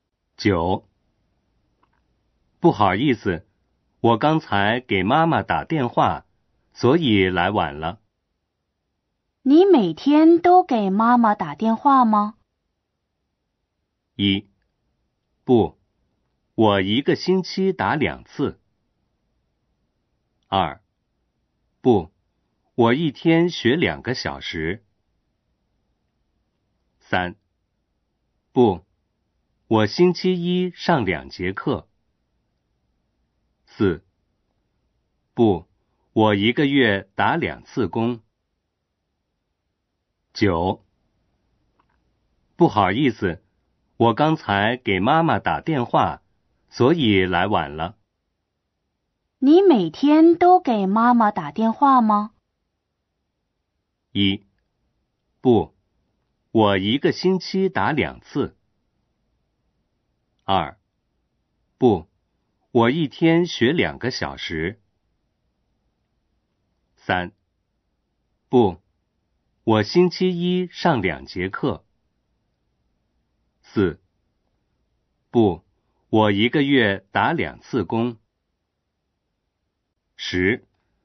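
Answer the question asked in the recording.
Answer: 一: 不,我一个星期打两次。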